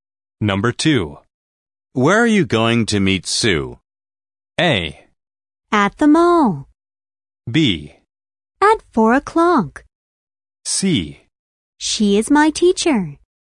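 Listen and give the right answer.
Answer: A: At the mall.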